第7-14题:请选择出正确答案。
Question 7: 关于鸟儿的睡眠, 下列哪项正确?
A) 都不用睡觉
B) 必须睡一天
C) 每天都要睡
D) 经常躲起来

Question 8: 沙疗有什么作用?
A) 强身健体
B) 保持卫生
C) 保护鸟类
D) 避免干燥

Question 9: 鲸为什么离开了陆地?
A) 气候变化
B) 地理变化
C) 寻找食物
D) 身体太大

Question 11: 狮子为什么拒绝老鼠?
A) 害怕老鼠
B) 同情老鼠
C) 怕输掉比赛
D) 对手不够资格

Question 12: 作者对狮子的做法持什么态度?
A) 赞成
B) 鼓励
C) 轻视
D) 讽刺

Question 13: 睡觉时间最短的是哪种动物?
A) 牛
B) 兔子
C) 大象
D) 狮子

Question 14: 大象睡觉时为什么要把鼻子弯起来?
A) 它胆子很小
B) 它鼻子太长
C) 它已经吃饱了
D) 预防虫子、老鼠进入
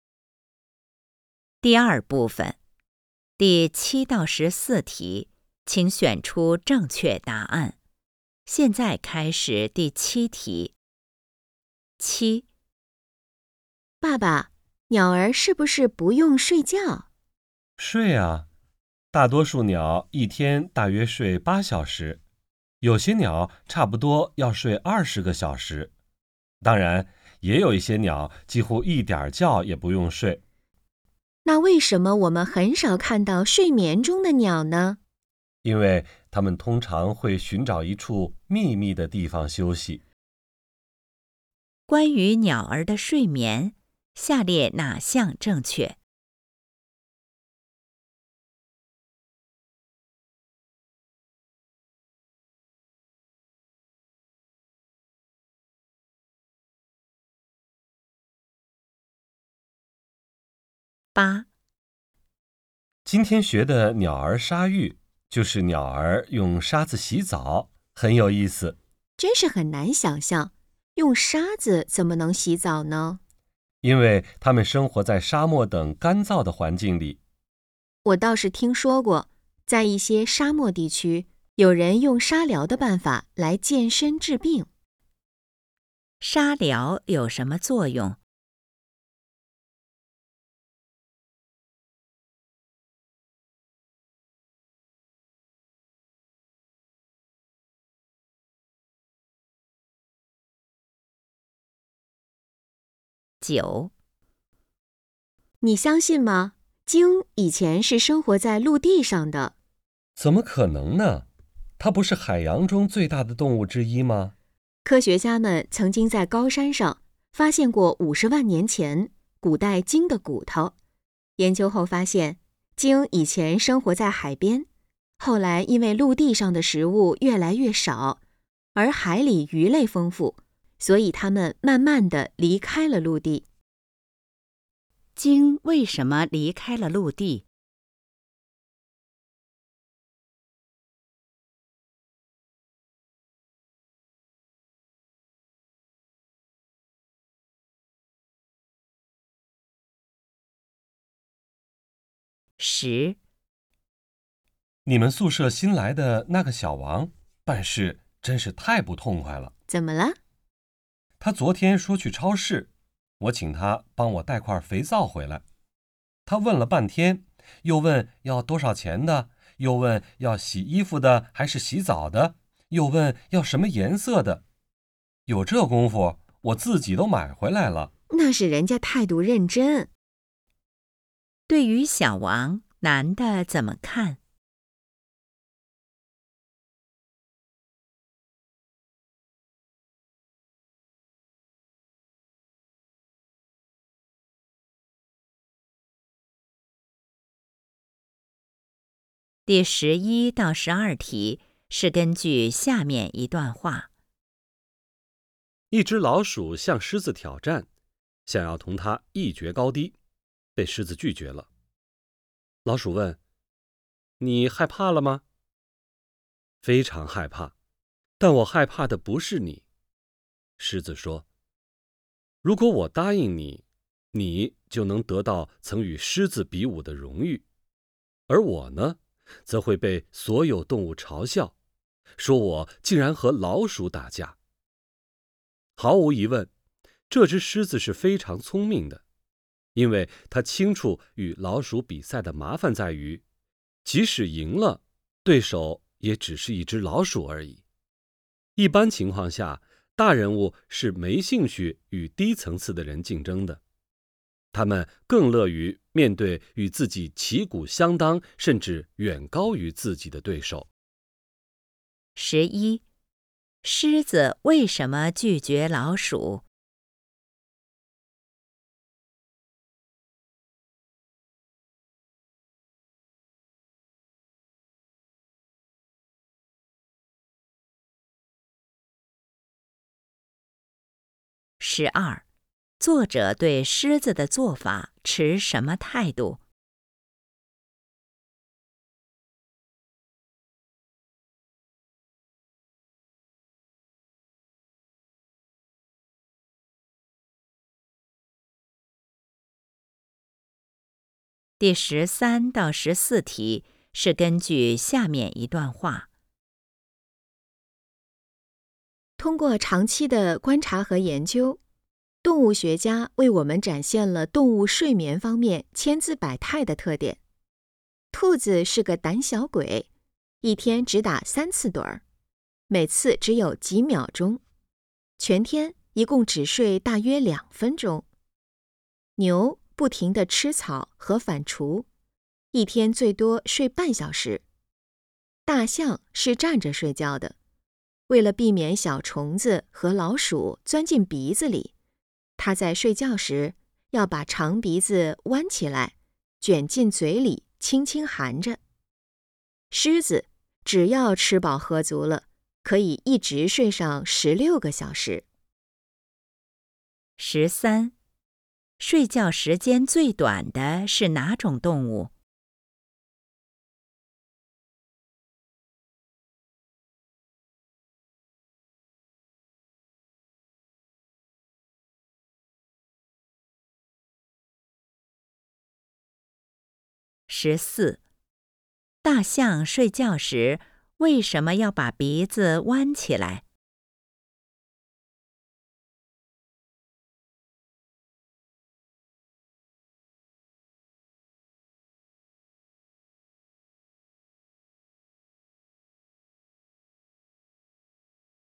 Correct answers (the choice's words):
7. 经常躲起来
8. 强身健体
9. 寻找食物
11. 对手不够资格
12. 赞成
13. 兔子
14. 预防虫子、老鼠进入

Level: HSK 5